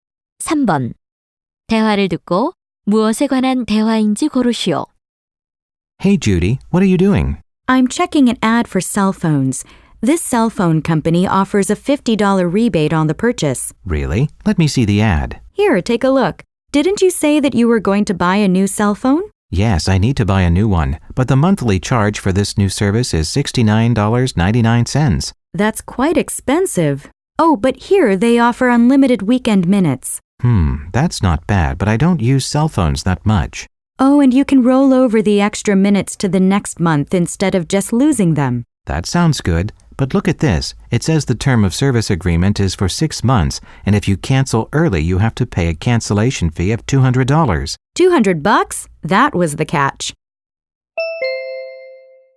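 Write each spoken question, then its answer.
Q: 대화를 듣고 무엇에 관한 대화인지 고르시오.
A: 휴대전화 서비스 광고(요금제 조건)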